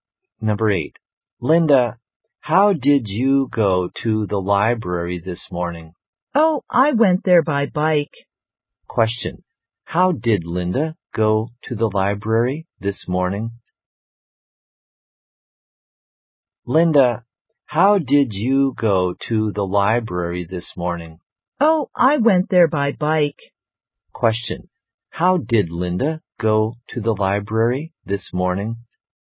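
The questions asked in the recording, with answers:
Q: How did Linda go to the library this morning?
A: By bike.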